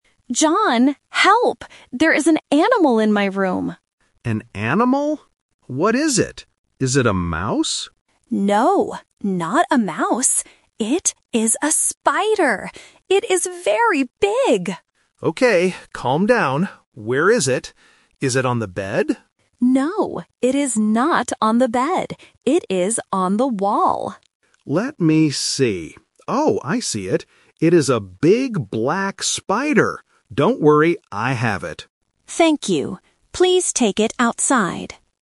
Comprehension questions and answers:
Listen to two housemates talking. Choose the correct answer (A, B, or C) for each question.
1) What animal is in the room?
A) A mouse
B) A spider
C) A snake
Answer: A spider

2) Where is the animal?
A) On the bed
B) On the floor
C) On the wall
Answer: On the wall

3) What color is the animal?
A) Black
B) Brown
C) White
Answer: Black

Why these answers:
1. Lisa says, "It is a spider". Option A (A mouse) is the trap because John asks, "Is it a mouse?" but Lisa says "No." Option C (A snake) is not mentioned in the audio.
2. Lisa says, "It is on the wall." Option A (On the bed) is the trap because John asks about it, but Lisa says, "No, it is not on the bed." Option B (On the floor) is not mentioned.
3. John says, "It is a big black spider." Option B (Brown) and Option C (White) are plausible colors for an animal, but they are not mentioned in the audio.

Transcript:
Lisa: John, help! There is an animal in my room!
John: An animal? What is it? Is it a mouse?
Lisa: No, not a mouse. It is a spider. It is very big!
John: Okay, calm down. Where is it? Is it on the bed?
Lisa: No, it is not on the bed. It is on the wall.
John: Let me see. Oh, I see it. It is a big black spider. Don't worry, I have it.
Lisa: Thank you! Please take it outside!

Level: A1

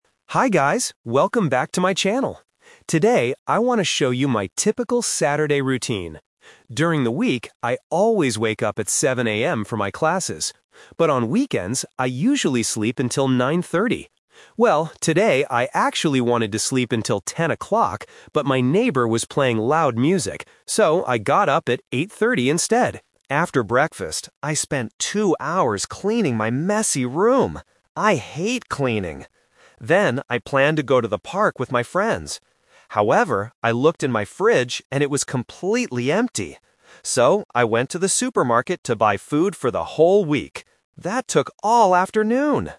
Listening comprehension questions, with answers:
Listen to the vlog and choose the correct answer (A, B, or C).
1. What time did the vlogger wake up today?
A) 7:00 AM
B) 8:30 AM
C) 10:00 AM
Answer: 8:30 AM

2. What did the vlogger do after breakfast?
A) She cleaned her room.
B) She went to the park.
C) She listened to music.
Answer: She cleaned her room.

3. Why did the vlogger go to the supermarket?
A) To meet her friends.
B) To buy a new fridge.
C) To buy food for the week.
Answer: To buy food for the week.

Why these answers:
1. The vlogger says, "So, I got up at 8:30 instead." Option A (7:00 AM) is a trap because that is her wake-up time during the week. Option C (10:00 AM) is a trap because she wanted to sleep until 10:00, but the loud music woke her up.
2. She clearly states, "After breakfast, I spent two hours cleaning my messy room." Option B (went to the park) is a trap because she planned to do that later, but she couldn't. Option C is a trap because her neighbor played music, not her.
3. She says, "So, I went to the supermarket to buy food for the whole week." Option A is a trap because her friends were part of her canceled park plan. Option B is a trap because her fridge was "empty", she didn't need to buy a new fridge.

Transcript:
Vlogger: Hi guys, welcome back to my channel! Today, I want to show you my typical Saturday routine. During the week, I always wake up at 7:00 AM for my classes. But on weekends, I usually sleep until 9:30. Well, today I actually wanted to sleep until 10:00, but my neighbor was playing loud music. So, I got up at 8:30 instead. After breakfast, I spent two hours cleaning my messy room. I hate cleaning! Then, I planned to go to the park with my friends. However, I looked in my fridge and it was completely empty. So, I went to the supermarket to buy food for the whole week. That took all afternoon!

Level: A2

